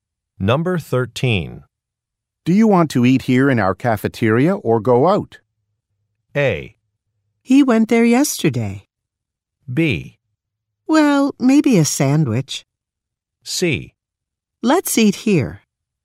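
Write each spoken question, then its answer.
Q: Do you want to eat here in our cafeteria or go out?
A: C: Let's eat here.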